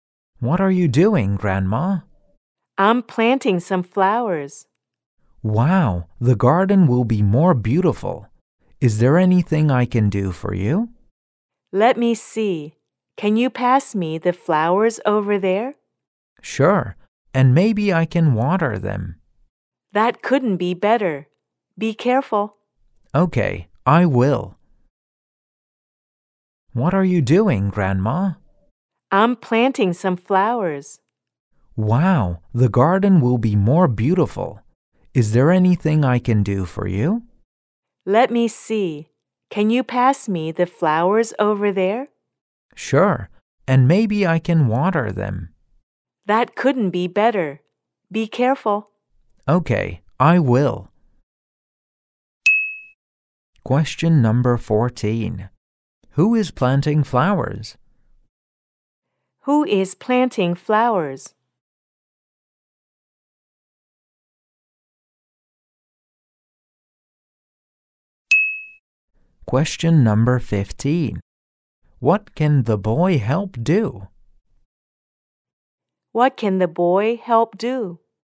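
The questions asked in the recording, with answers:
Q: Who is planting flowers?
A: Grandma.

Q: What can the boy help do?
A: Pass the flowers and water them.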